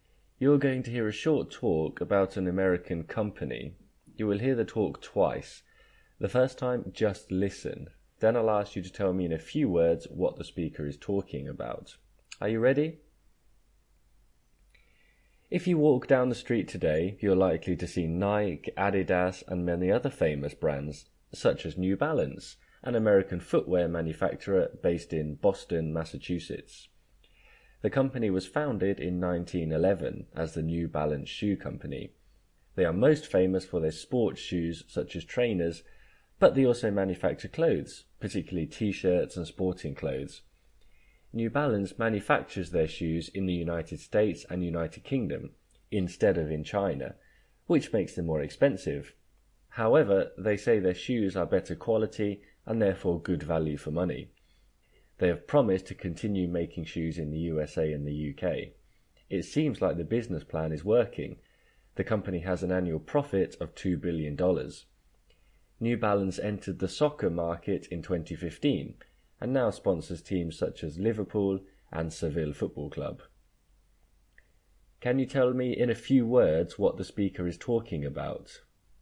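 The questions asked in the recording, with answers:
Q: Can you tell me in a few words what the speaker is talking about?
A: New Balance, an American footwear company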